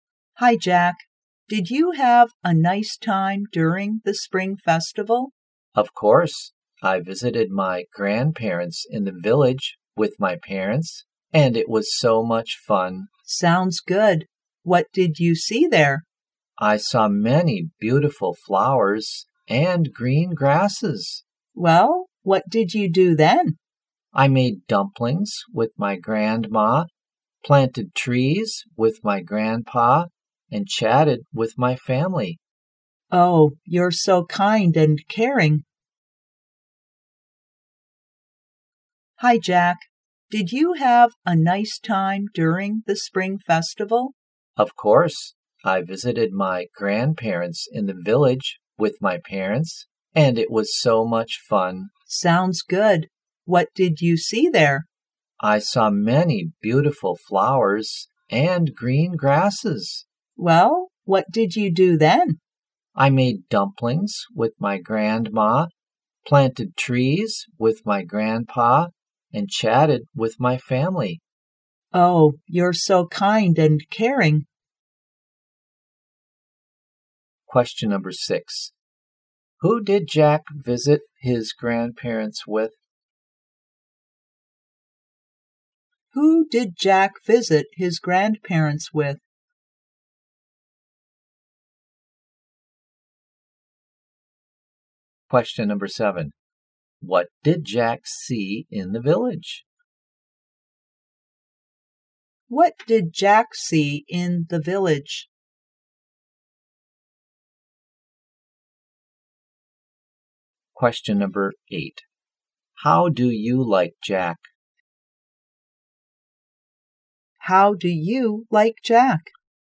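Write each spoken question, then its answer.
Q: Who did Jack visit his grandparents with?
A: His parents

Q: What did Jack see in the village?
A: Beautiful flowers and green grass

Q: How do you like Jack?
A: Kind and caring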